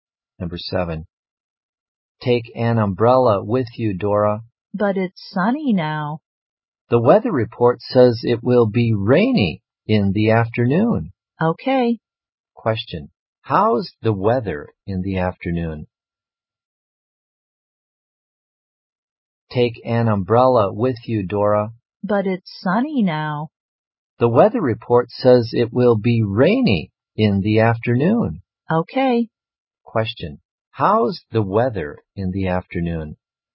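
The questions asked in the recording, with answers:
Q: How's the weather in the afternoon?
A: Rainy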